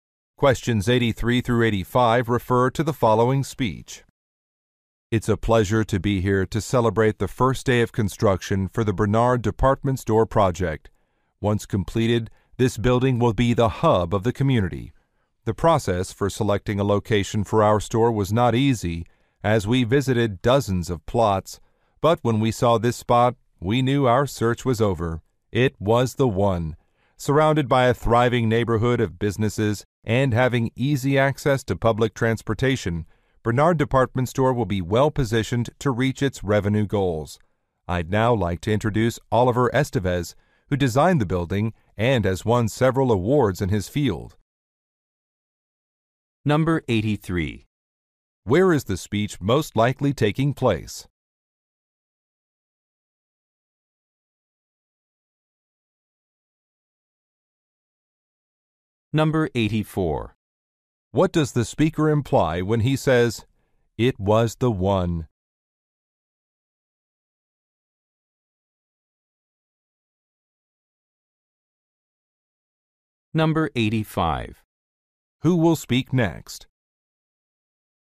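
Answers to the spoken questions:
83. At a construction site for a department store
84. The location was ideal for the store
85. An architect (Oliver Estevez)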